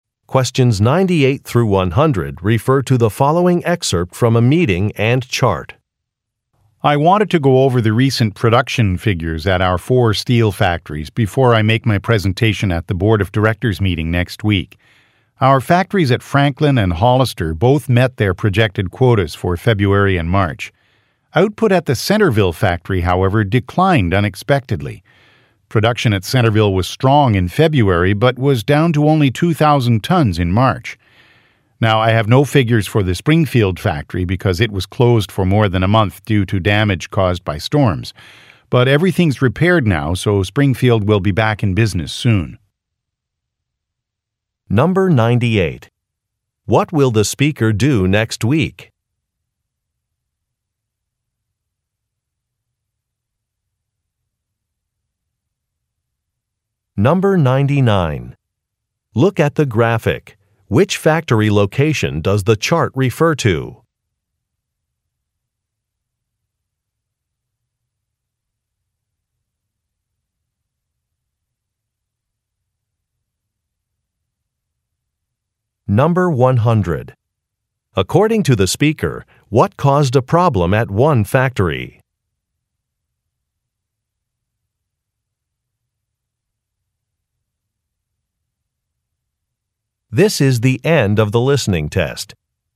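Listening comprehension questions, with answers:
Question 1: What will the speaker do next week?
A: Meet with a board of directors

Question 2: According to the speaker, what caused a problem at one factory?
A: Bad weather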